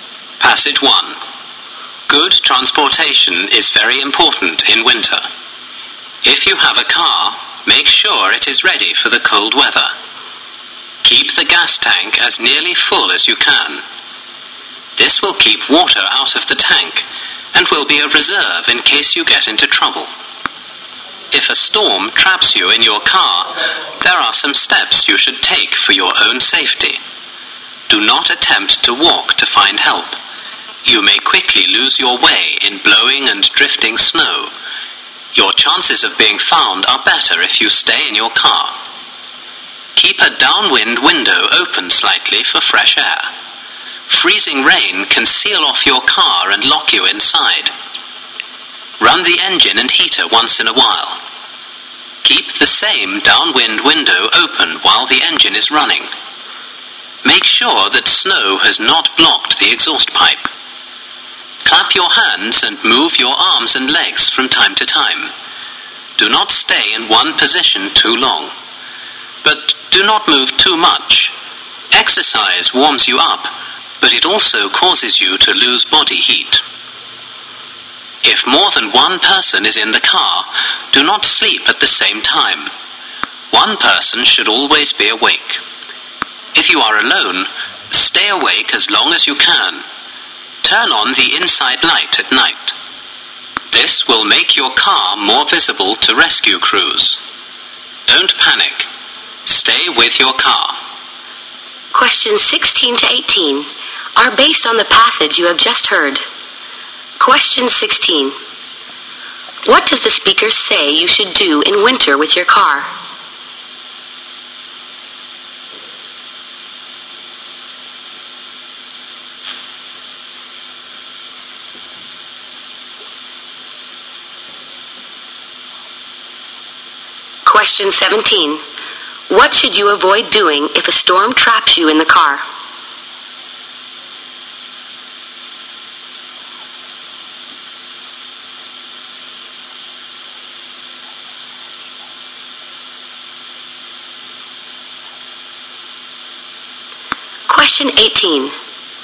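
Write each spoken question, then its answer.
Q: What does the speaker say you should do in winter with your car?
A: Keep the gas tank as nearly full as possible.

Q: What should you avoid doing if a storm traps you in the car?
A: Walking to find help.

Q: Why is too much exercise undesirable when you are trapped in a car by a winter storm?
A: It causes you to lose body heat.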